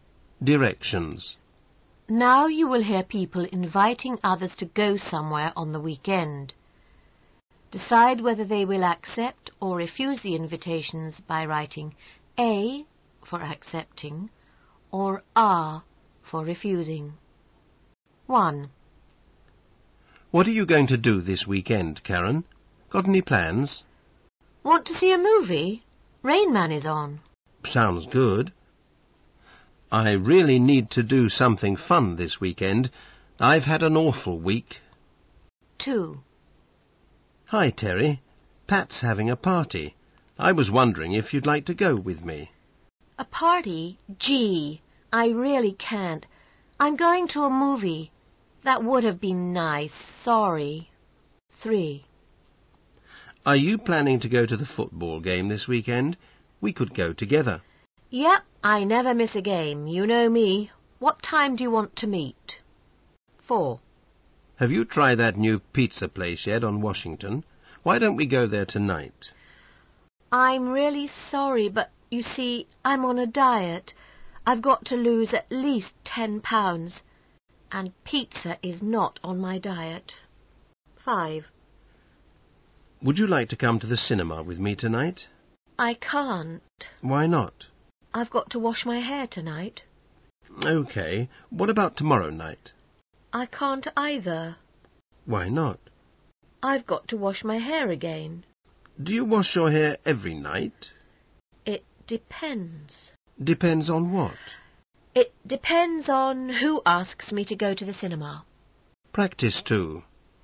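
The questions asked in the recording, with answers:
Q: Decide whether they will accept or refuse the invitations by writing A for accepting or R for refusing.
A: A (accepting)

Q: Decide whether they will accept or refuse the invitations by writing A for accepting or R for refusing.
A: R (refusing)

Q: Decide whether they will accept or refuse the invitations by writing A for accepting or R for refusing.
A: A (accepting)

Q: Decide whether they will accept or refuse the invitations by writing A for accepting or R for refusing.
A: R (refusing)

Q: Decide whether they will accept or refuse the invitations by writing A for accepting or R for refusing.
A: R (refusing)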